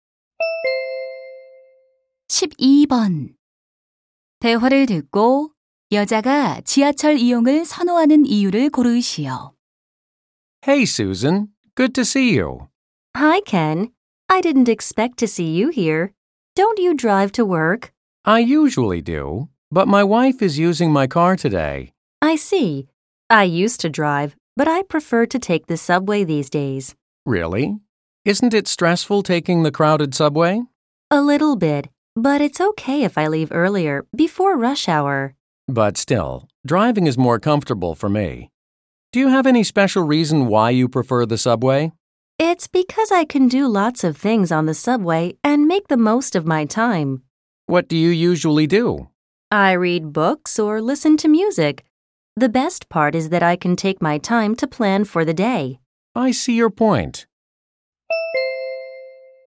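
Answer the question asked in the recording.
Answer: 여러 가지 일을 하며 시간을 최대한 활용할 수 있어서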